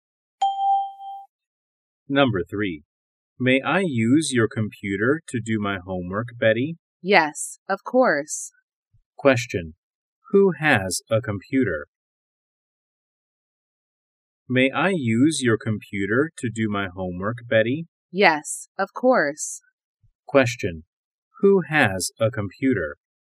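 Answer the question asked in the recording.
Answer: Betty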